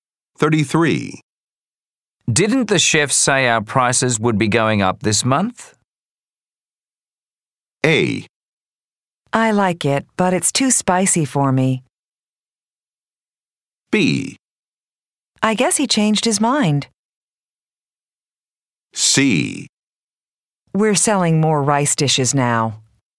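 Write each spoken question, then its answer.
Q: Didn't the chef say our prices would be going up this month?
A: B: I guess he changed his mind.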